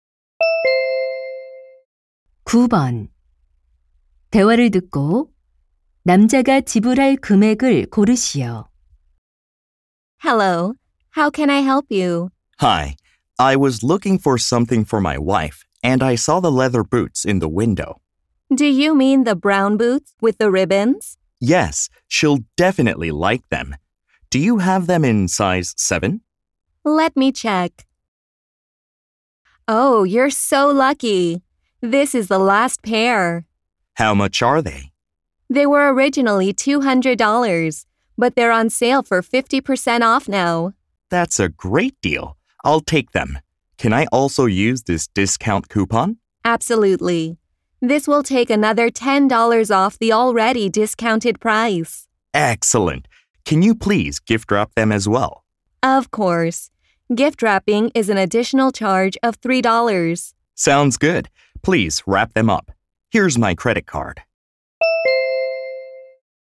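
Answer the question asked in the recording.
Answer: $93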